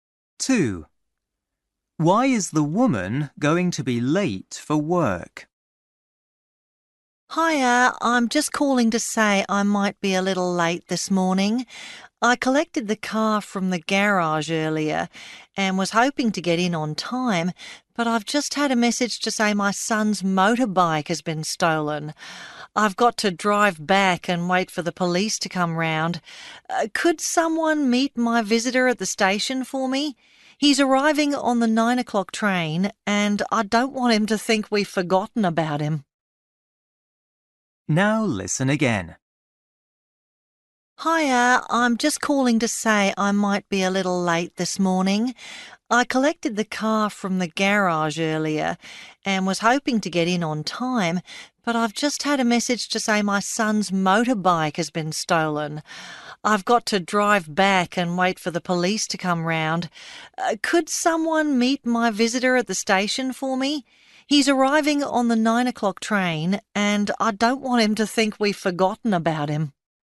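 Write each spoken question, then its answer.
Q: Why is the woman going to be late for work?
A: Her son's motorbike has been stolen and she must wait for the police.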